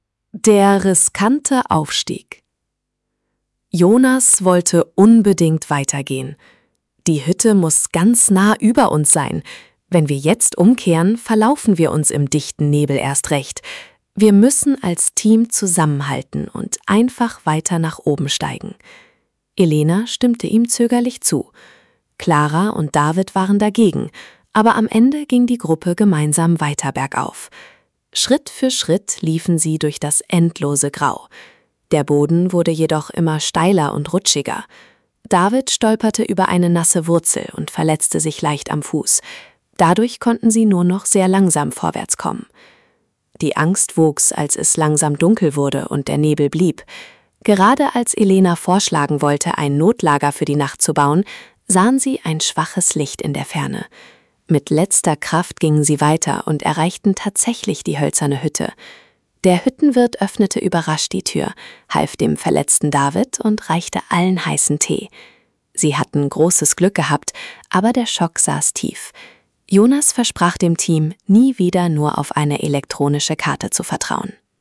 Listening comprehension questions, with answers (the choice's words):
Wählen Sie bei den folgenden Aufgaben die einzig richtige Option aus. (Die richtigen Antworten sind gleichmäßig über A, B, C und D verteilt!)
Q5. Was passiert in Option 1, als die Gruppe weiter bergauf steigt?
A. Die Wanderer finden sofort einen neuen Weg.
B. David stolperte über eine Wurzel und verletzte sich am Fuß.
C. Der Nebel lichtet sich nach zehn Minuten komplett.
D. Jonas verliert seine Brille im dichten Grau.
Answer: David stolperte über eine Wurzel und verletzte sich am Fuß.

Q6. Wer hilft der Gruppe am Ende von Option 1?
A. Ein professionelles Rettungsteam mit Hubschraubern.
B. Claras Familie, die im Tal gewartet hat.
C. Der Wirt einer hölzernen Hütte, die sie erreichen.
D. Ein anderer Wanderer, der zufällig vorbeikommt.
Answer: Der Wirt einer hölzernen Hütte, die sie erreichen.

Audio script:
Option 1: Der riskante Aufstieg
Der riskante Aufstieg
Jonas wollte unbedingt weitergehen. „Die Hütte muss ganz nah über uns sein. Wenn wir jetzt umkehren, verlaufen wir uns im dichten Nebel erst recht. Wir müssen als Team zusammenhalten und einfach weiter nach oben steigen." Elena stimmte ihm zögerlich zu. Clara und David waren dagegen, aber am Ende ging die Gruppe gemeinsam weiter bergauf. Schritt für Schritt liefen sie durch das endlose Grau. Der Boden wurde jedoch immer steiler und rutschiger. David stolperte über eine nasse Wurzel und verletzte sich leicht am Fuß. Dadurch konnten sie nur noch sehr langsam vorwärtskommen.
Die Angst wuchs, als es langsam dunkel wurde und der Nebel blieb. Gerade als Elena vorschlagen wollte, ein Notlager für die Nacht zu bauen, sahen sie ein schwaches Licht in der Ferne. Mit letzter Kraft gingen sie weiter und erreichten tatsächlich die hölzerne Hütte. Der Hüttenwirt öffnete überrascht die Tür, half dem verletzten David und reichte allen heißen Tee. Sie hatten großes Glück gehabt, aber der Schock saß tief. Jonas versprach dem Team, nie wieder nur auf eine elektronische Karte zu vertrauen.

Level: B1